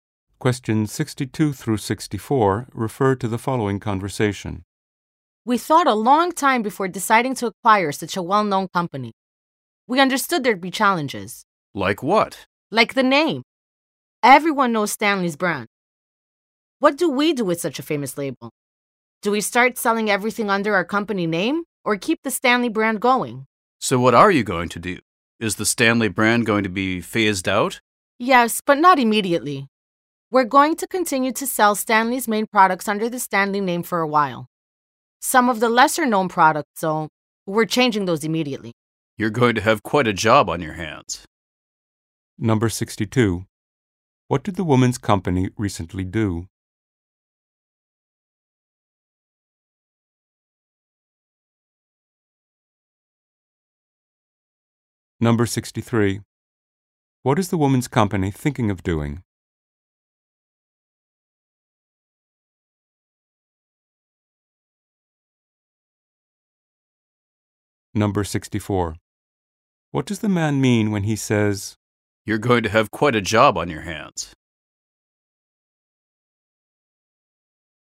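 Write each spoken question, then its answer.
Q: What did the woman's company recently do?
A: Acquired Stanley's company

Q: What is the woman's company thinking of doing?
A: Gradually phasing out the Stanley brand

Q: What does the man mean when he says,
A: The task will be difficult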